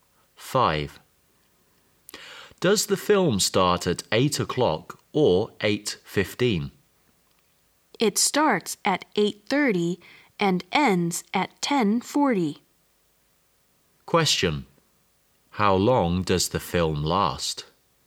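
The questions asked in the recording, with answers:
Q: How long does the film last?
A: 2 hours and 10 minutes.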